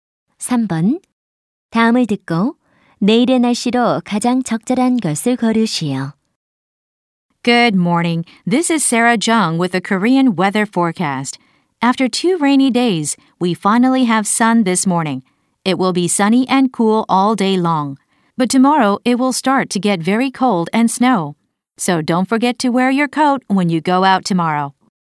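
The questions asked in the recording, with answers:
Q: 다음을 듣고 내일의 날씨로 가장 적절한 것을 고르시오.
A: 매우 춥고 눈이 옴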